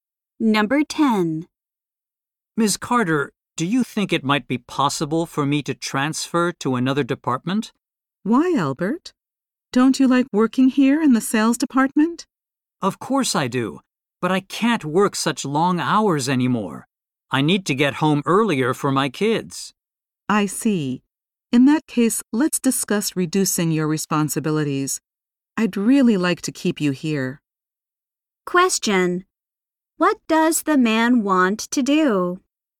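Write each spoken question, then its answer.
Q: What does the man want to do?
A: Transfer to another department.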